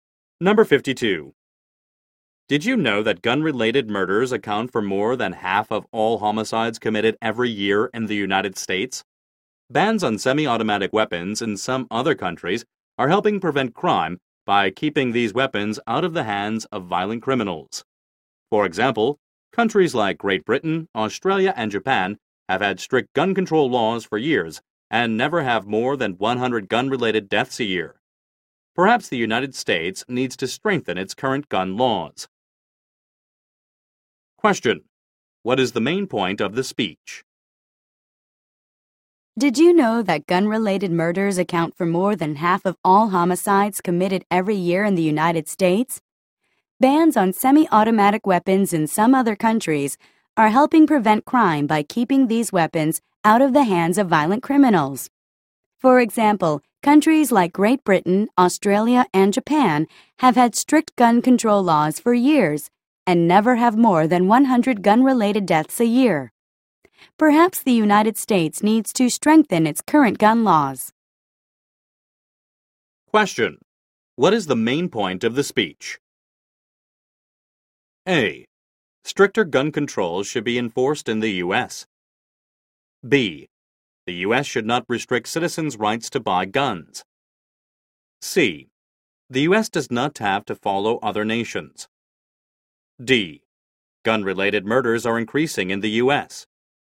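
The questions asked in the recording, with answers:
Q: What is the main point of the speech?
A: A: Stricter gun controls should be enforced in the U.S.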